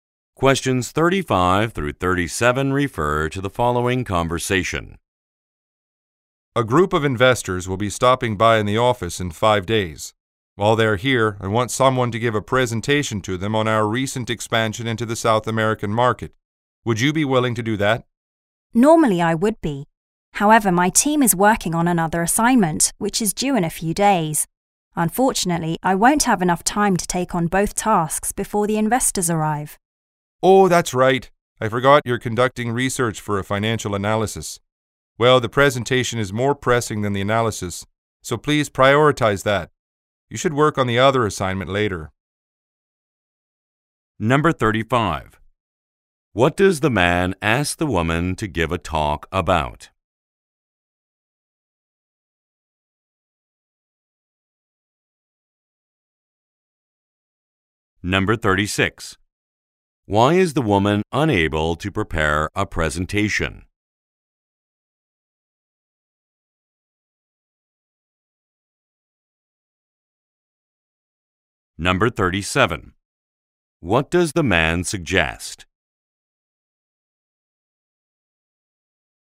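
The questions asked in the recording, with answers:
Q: What does the man ask the woman to give a talk about?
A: The recent expansion into the South American market

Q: Why is the woman unable to prepare a presentation?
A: Her team is busy with another assignment due in a few days

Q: What does the man suggest?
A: Prioritize the presentation and do the other assignment later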